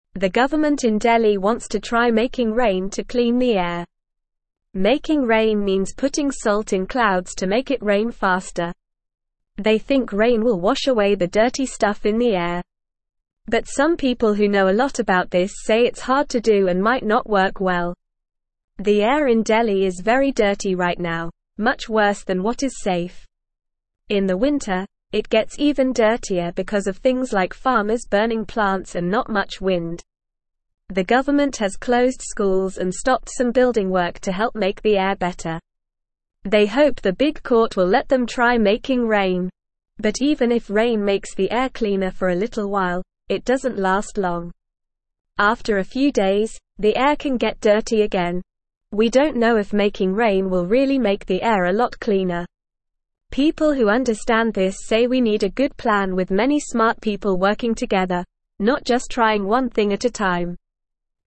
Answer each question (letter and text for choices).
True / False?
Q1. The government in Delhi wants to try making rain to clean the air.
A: True

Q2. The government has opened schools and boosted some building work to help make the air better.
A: False

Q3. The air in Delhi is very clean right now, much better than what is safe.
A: False

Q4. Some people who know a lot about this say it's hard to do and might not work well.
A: True

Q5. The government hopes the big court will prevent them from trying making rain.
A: False

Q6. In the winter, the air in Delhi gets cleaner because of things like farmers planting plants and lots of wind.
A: False

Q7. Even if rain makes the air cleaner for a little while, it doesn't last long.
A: True

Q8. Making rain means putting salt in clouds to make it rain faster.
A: True

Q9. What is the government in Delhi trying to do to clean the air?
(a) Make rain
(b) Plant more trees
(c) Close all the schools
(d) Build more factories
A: (a) Make rain

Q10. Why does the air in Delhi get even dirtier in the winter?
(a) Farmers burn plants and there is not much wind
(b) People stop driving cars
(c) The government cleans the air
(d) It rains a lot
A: (a) Farmers burn plants and there is not much wind

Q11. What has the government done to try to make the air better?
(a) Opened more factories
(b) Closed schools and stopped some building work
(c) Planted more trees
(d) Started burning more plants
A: (b) Closed schools and stopped some building work

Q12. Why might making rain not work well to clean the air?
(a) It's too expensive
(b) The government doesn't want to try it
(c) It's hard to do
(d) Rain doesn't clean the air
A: (c) It's hard to do

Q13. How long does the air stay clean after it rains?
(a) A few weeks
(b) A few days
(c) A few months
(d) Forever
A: (b) A few days

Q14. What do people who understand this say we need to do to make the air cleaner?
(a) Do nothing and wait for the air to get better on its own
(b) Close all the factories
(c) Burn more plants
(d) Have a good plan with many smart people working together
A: (d) Have a good plan with many smart people working together

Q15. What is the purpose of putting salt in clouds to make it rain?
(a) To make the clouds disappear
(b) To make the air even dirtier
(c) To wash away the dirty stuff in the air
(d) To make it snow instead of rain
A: (c) To wash away the dirty stuff in the air

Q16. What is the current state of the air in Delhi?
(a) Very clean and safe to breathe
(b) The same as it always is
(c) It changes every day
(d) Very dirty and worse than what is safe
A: (d) Very dirty and worse than what is safe

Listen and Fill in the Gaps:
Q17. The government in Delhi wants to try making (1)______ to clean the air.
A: rain

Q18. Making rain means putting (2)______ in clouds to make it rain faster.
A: salt

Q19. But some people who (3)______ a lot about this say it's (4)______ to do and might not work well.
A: know

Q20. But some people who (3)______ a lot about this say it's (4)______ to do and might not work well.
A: hard

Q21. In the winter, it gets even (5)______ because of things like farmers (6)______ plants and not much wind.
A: dirtier

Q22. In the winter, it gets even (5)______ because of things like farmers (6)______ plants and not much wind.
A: burning

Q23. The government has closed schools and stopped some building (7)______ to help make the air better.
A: work

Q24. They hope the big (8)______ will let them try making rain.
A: court

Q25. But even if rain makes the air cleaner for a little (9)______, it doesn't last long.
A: while

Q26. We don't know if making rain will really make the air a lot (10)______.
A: cleaner

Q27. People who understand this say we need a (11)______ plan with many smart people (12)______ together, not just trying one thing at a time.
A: good

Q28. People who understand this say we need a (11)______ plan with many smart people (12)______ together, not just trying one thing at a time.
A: working

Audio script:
They think rain will wash away the dirty stuff in the air. But some people who know a lot about this say it's hard to do and might not work well.
The air in Delhi is very dirty right now, much worse than what is safe. In the winter, it gets even dirtier because of things like farmers burning plants and not much wind. The government has closed schools and stopped some building work to help make the air better. They hope the big court will let them try making rain.
But even if rain makes the air cleaner for a little while, it doesn't last long. After a few days, the air can get dirty again. We don't know if making rain will really make the air a lot cleaner. People who understand this say we need a good plan with many smart people working together, not just trying one thing at a time.

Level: Level 2